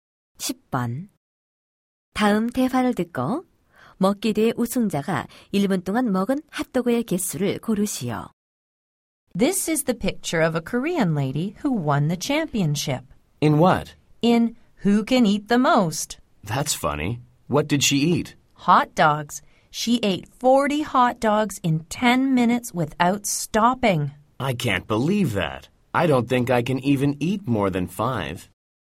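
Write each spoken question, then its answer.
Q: 다음 대화를 듣고 먹기 대회 우승자가 1분 동안 먹은 핫도그의 개수를 고르시오.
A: 4개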